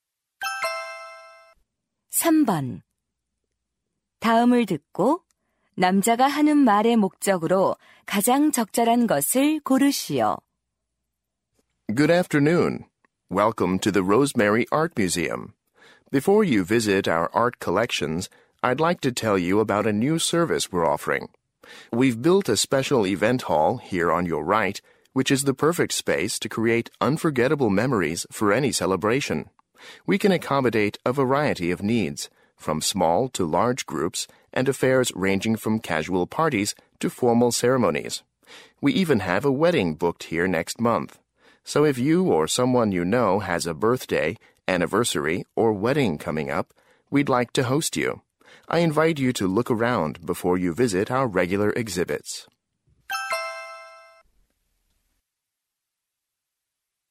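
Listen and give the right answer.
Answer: 미술관의 새 행사장 대여 서비스를 홍보하려고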